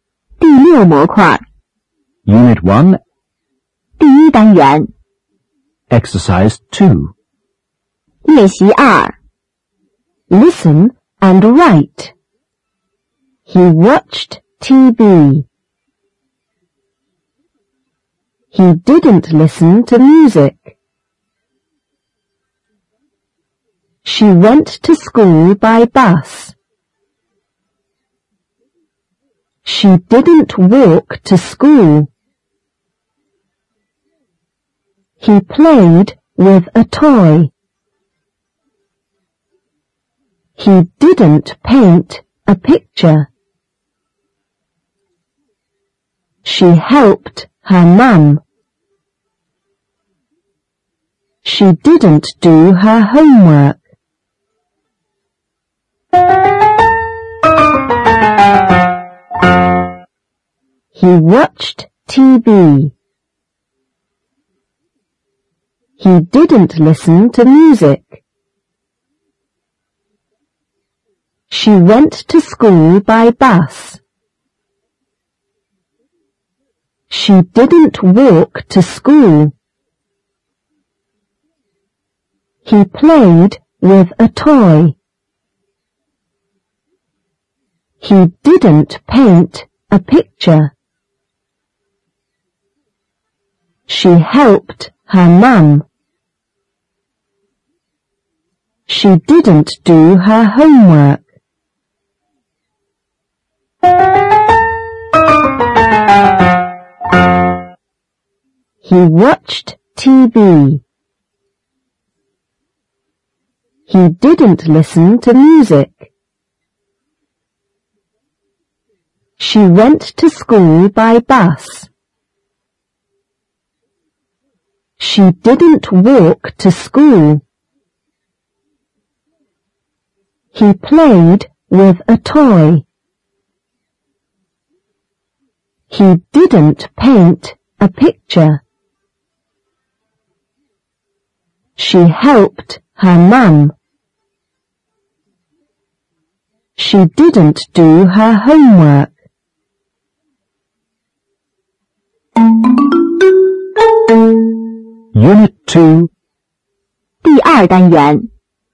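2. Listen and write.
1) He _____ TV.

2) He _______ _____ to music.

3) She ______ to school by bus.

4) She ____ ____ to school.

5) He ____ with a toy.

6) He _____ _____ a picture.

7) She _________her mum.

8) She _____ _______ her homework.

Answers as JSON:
{"1": "watched", "2": "didn't listen", "3": "went", "4": "didn't walk", "5": "played", "6": "didn't paint", "7": "helped", "8": "didn't do"}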